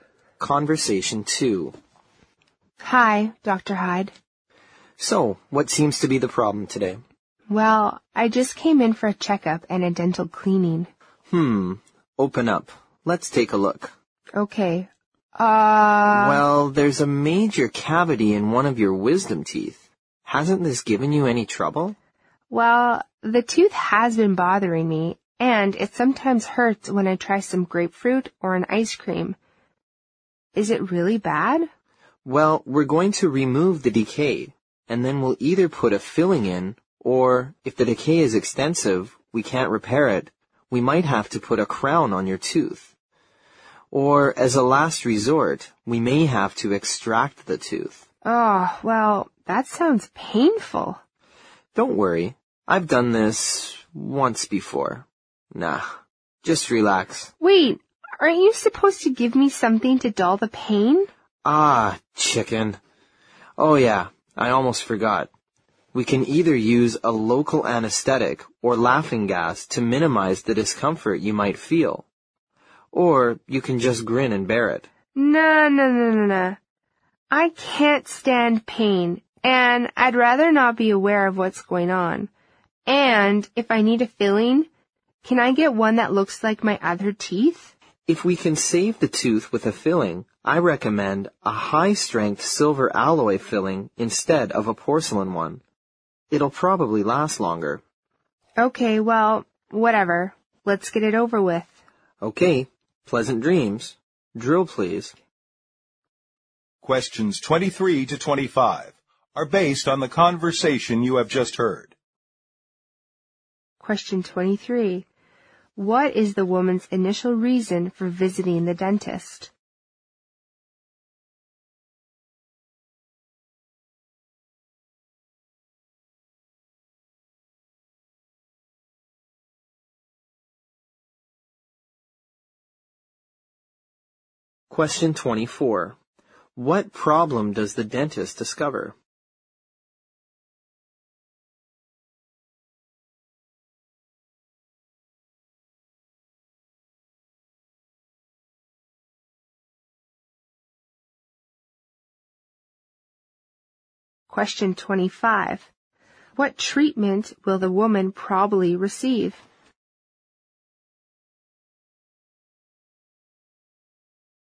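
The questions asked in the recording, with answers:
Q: What is the woman's initial reason for visiting the dentist?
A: For a checkup and a dental cleaning

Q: What problem does the dentist discover?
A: A major cavity in one of her wisdom teeth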